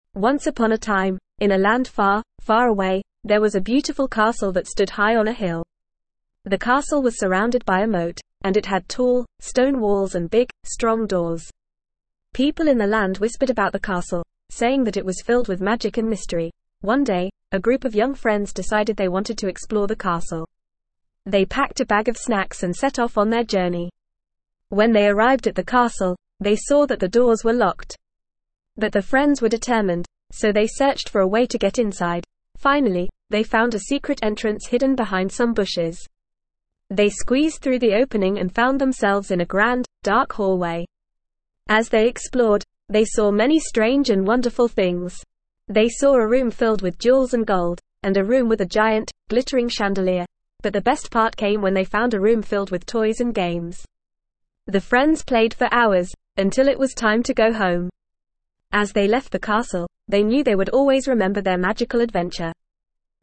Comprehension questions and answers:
Please fill in the gaps.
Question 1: The castle was surrounded by a _____.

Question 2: The friends found a _____ entrance hidden behind some bushes.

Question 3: The room was filled with _____ and gold.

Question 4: There was a room with a giant, glittering _____.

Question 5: The friends played for hours in the room filled with _____ and games.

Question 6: The friends knew they would always remember their magical _____.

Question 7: The castle had tall, stone _____ and big, strong doors.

Please answer the following questions with your teacher or partner.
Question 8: What was the castle surrounded by?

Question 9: How did the friends get into the castle?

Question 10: What did the friends do in the room filled with toys and games?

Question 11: What was whispered about the castle?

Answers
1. moat
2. secret
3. jewels
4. chandelier
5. toys
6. adventure
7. walls
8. The castle was surrounded by a moat.
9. The friends found a secret entrance hidden behind some bushes and squeezed through it.
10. The friends played for hours in the room filled with toys and games.
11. People in the land whispered that the castle was filled with magic and mystery.

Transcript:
Once upon a time, in a land far, far away, there was a beautiful castle that stood high on a hill. The castle was surrounded by a moat, and it had tall, stone walls and big, strong doors. People in the land whispered about the castle, saying that it was filled with magic and mystery.
One day, a group of young friends decided they wanted to explore the castle. They packed a bag of snacks and set off on their journey. When they arrived at the castle, they saw that the doors were locked. But the friends were determined, so they searched for a way to get inside.
Finally, they found a secret entrance hidden behind some bushes. They squeezed through the opening and found themselves in a grand, dark hallway. As they explored, they saw many strange and wonderful things. They saw a room filled with jewels and gold, and a room with a giant, glittering chandelier.
But the best part came when they found a room filled with toys and games. The friends played for hours, until it was time to go home. As they left the castle, they knew they would always remember their magical adventure.

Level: Level 1